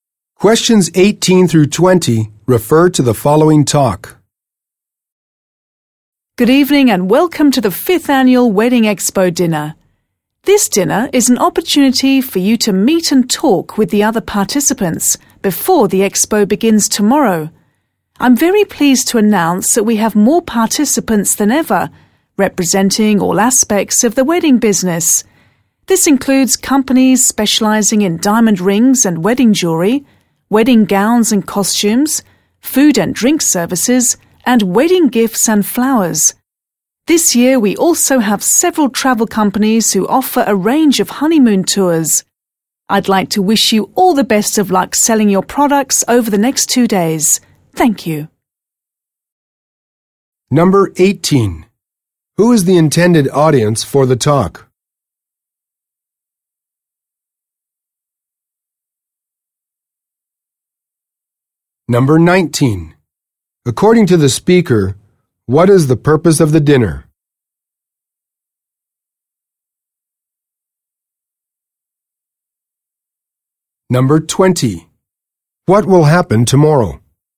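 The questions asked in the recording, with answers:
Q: Who is the intended audience for the talk?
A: Participants (companies) in the wedding expo

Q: According to the speaker, what is the purpose of the dinner?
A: To let participants meet and talk with each other before the expo

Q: What will happen tomorrow?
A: The Wedding Expo will begin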